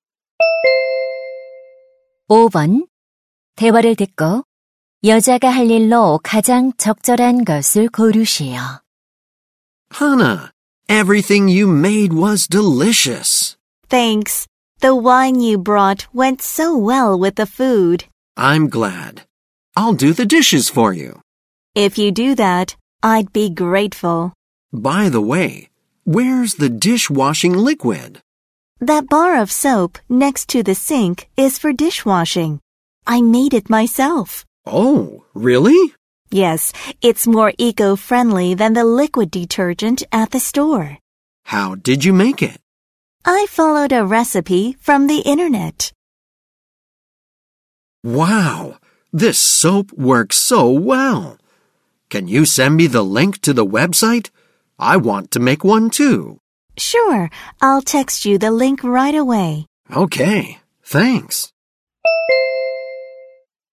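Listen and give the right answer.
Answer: 비누 만드는 웹사이트 링크를 문자로 보내기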